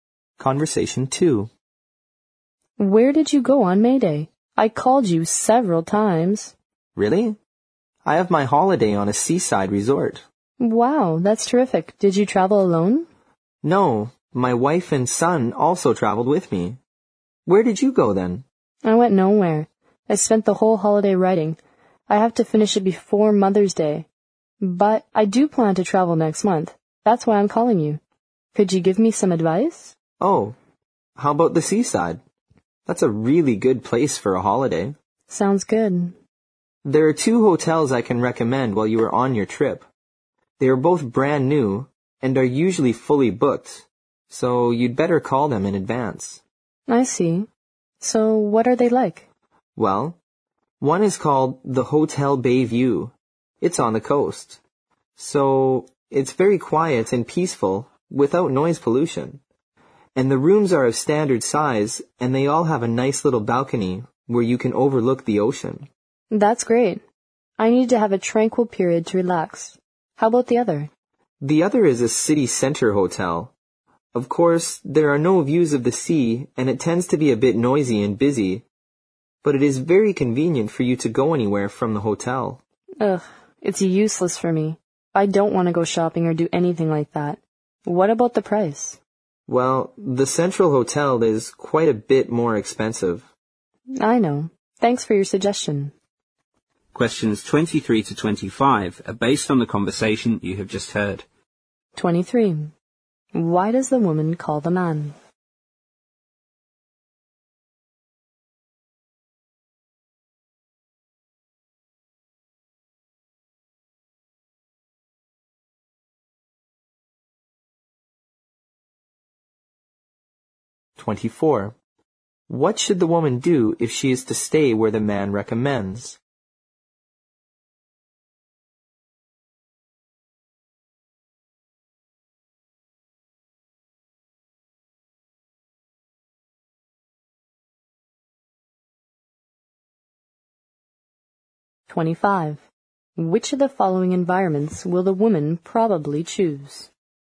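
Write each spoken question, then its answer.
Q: What should the woman do if she is to stay where the man recommends?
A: Book the hotel in advance

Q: Which of the following environments will the woman probably choose?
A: A quiet, peaceful hotel by the sea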